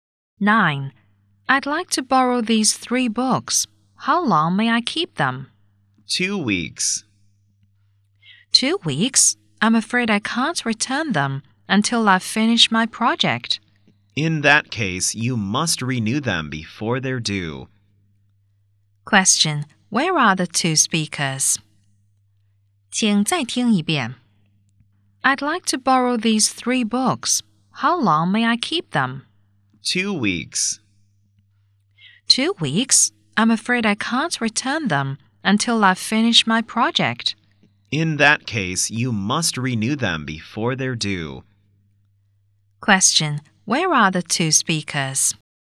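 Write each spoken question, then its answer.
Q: Where are the 2 speakers?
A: In a library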